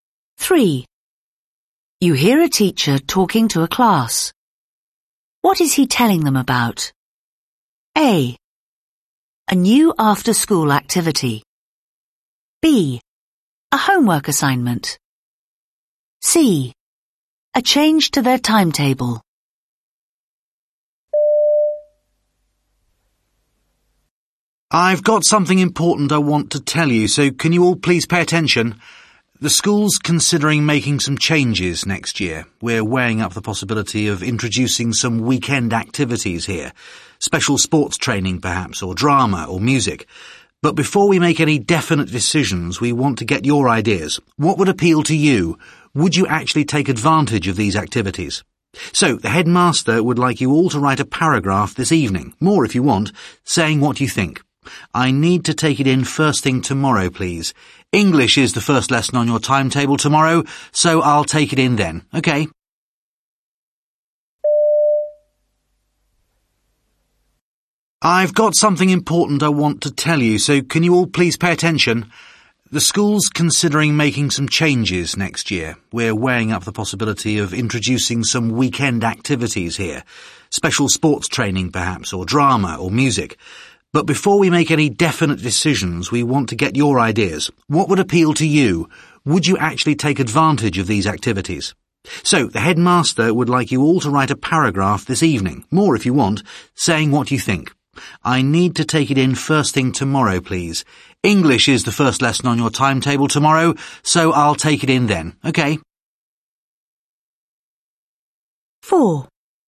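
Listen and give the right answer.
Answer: B: A homework assignment.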